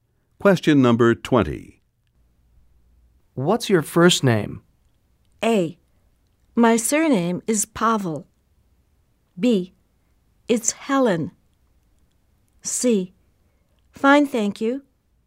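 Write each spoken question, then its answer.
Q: What's your first name?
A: B: It's Helen.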